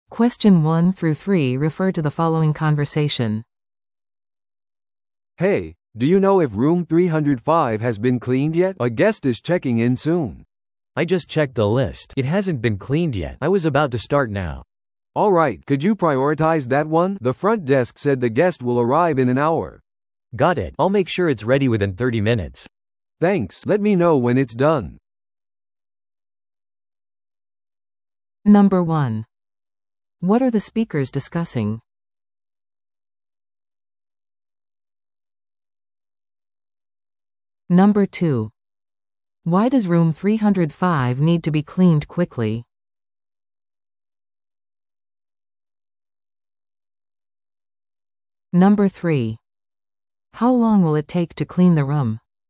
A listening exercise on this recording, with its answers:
Listen to the audio below and answer the questions.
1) What are the speakers discussing?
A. メンテナンスの問題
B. 掃除が必要な部屋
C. ホテル内での紛失物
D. 宿泊客の特別なリクエスト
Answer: 掃除が必要な部屋

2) Why does Room 305 need to be cleaned quickly?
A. VIPゲストが到着するため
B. フロントデスクからの要請があったため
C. メンテナンスの問題があったため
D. ゲストが何かを部屋に置き忘れたため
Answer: フロントデスクからの要請があったため

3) How long will it take to clean the room?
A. 15分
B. 30分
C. 45分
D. 1時間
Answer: 30分

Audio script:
A: "Hey, do you know if Room 305 has been cleaned yet? A guest is checking in soon."
B: "I just checked the list. It hasn't been cleaned yet. I was about to start now."
A: "Alright. Could you prioritize that one? The front desk said the guest will arrive in an hour."
B: "Got it. I'll make sure it's ready within 30 minutes."
A: "Thanks! Let me know when it's done."

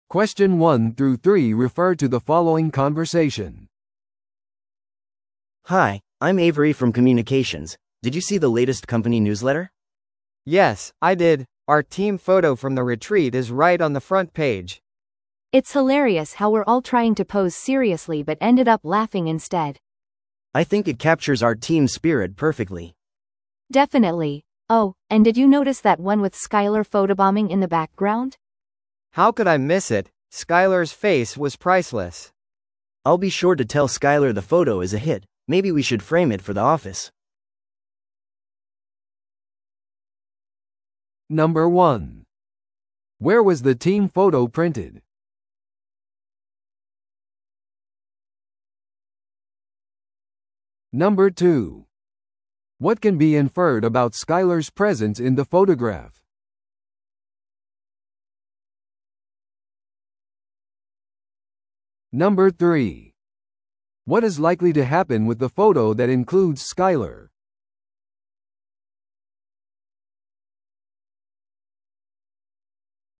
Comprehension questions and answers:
Listen to the audio below and answer the questions.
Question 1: Where was the team photo printed?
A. 会社のニュースレターの表紙に。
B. 地元の新聞に。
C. リトリートのパンフレットに。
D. クライアントへのメールに。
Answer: 会社のニュースレターの表紙に。

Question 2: What can be inferred about Skyler's presence in the photograph?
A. Skylerが写真家であった。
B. Skylerが意図的に写真にポーズを取った。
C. Skylerが思いがけず写真に映っていた。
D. Skylerが写真をデジタル編集した。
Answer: Skylerが思いがけず写真に映っていた。

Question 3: What is likely to happen with the photo that includes Skyler?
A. ニュースレターから削除される。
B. マーケティングキャンペーンに使われる。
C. オフィスに飾るために額に入れられる。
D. Skylerにプレゼントとして送られる。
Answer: オフィスに飾るために額に入れられる。

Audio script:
A: Hi, I'm Avery from communications. Did you see the latest company newsletter?
B: Yes, I did! Our team photo from the retreat is right on the front page!
C: It's hilarious how we're all trying to pose seriously but ended up laughing instead.
A: I think it captures our team spirit perfectly.
C: Definitely. Oh, and did you notice that one with Skyler photobombing in the background?
B: How could I miss it? Skyler's face was priceless!
A: I'll be sure to tell Skyler the photo is a hit. Maybe we should frame it for the office!

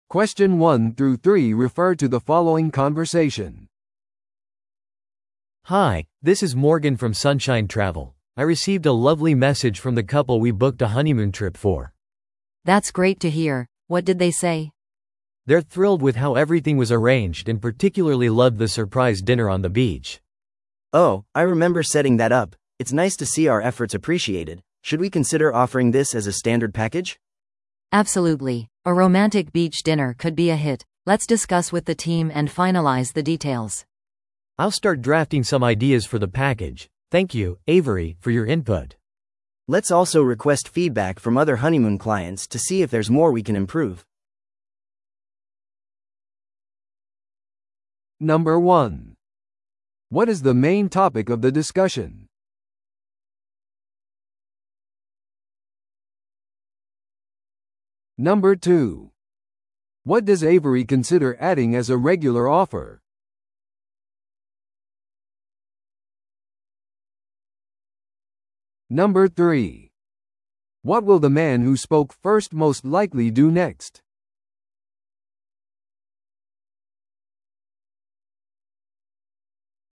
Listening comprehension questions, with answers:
Listen to the audio below and answer the questions.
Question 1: What is the main topic of the discussion?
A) 提供する新しい旅行パッケージの選択。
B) 新婚旅行のクライアントからのフィードバックについて話し合う。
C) ビーチでのサプライズディナーの手配。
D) 旅行代理店のサービスをアップグレードする。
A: 新婚旅行のクライアントからのフィードバックについて話し合う。

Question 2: What does Avery consider adding as a regular offer?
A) クライアントのための新婚旅行の予約。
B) 代理店からの感謝のメッセージ。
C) 旅行パッケージでのロマンチックなビーチディナー。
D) 改善のためのクライアントからのフィードバックセッション。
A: 旅行パッケージでのロマンチックなビーチディナー。

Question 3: What will the man who spoke first most likely do next?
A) 夫婦に連絡してメッセージの詳細をもっと知る。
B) 新しい新婚旅行パッケージの下書きを作る。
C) 別のサプライズディナーを設定する。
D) パッケージについて話し合うチーム会議を準備する。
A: 新しい新婚旅行パッケージの下書きを作る。

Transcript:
A: Hi, this is Morgan from Sunshine Travel. I received a lovely message from the couple we booked a honeymoon trip for.
B: That's great to hear! What did they say?
A: They're thrilled with how everything was arranged and particularly loved the surprise dinner on the beach.
C: Oh, I remember setting that up. It's nice to see our efforts appreciated. Should we consider offering this as a standard package?
B: Absolutely, a romantic beach dinner could be a hit. Let's discuss with the team and finalize the details.
A: I'll start drafting some ideas for the package. Thank you, Avery, for your input.
C: Let's also request feedback from other honeymoon clients to see if there's more we can improve.

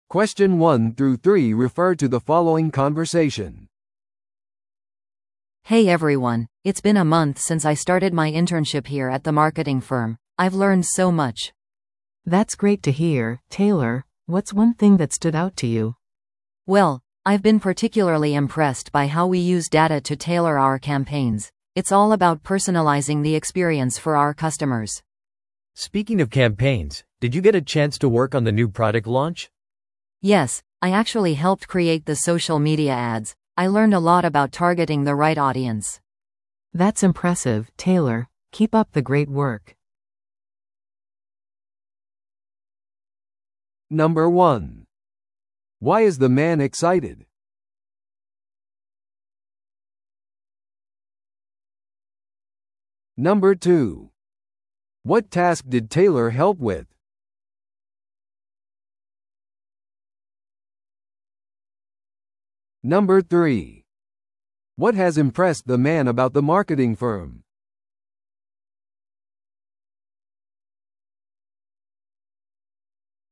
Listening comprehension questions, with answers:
Listen to the audio below and answer the questions.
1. Why is the man excited?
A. 最近昇進したから。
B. プロジェクトを完成させたから。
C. インターンシップから多くを学んだから。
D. 会社が大きなクライアントを獲得したから。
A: インターンシップから多くを学んだから。

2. What task did Taylor help with?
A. 会社のロゴをデザインする。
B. ソーシャルメディア広告を作成する。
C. 企業イベントを組織する。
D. 市場調査を行う。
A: ソーシャルメディア広告を作成する。

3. What has impressed the man about the marketing firm?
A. チームの多様性。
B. キャンペーンでのデータの使用。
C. 会社の革新的な製品。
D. 会社の大規模さ。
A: キャンペーンでのデータの使用。

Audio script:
A: Hey everyone, it's been a month since I started my internship here at the marketing firm. I've learned so much!
B: That's great to hear, Taylor! What's one thing that stood out to you?
A: Well, I've been particularly impressed by how we use data to tailor our campaigns. It's all about personalizing the experience for our customers.
C: Speaking of campaigns, did you get a chance to work on the new product launch?
A: Yes, I actually helped create the social media ads. I learned a lot about targeting the right audience.
B: That's impressive, Taylor. Keep up the great work!

